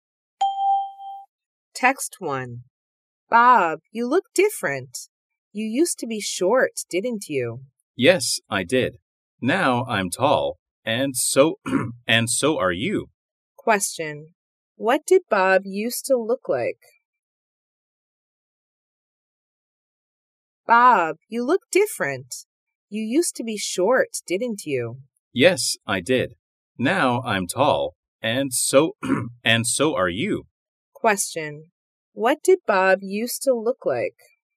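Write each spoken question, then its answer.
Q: What did Bob used to look like?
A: He used to be short.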